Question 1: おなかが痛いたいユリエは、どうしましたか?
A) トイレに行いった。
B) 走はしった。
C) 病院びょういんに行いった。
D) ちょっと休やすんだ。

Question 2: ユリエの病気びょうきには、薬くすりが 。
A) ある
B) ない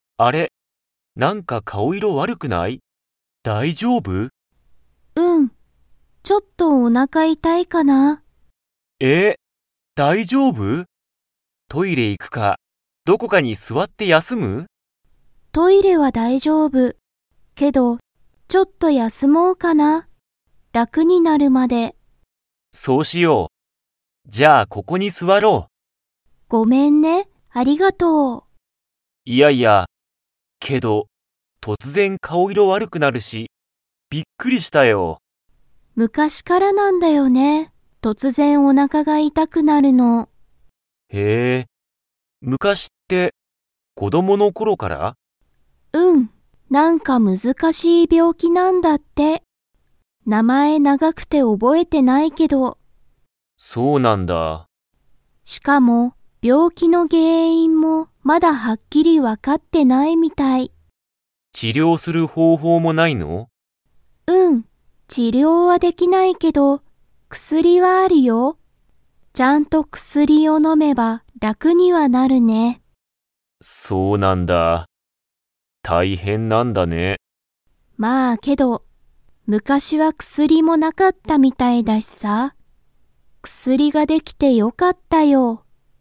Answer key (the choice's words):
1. ちょっと休やすんだ。
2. ある

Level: Level 4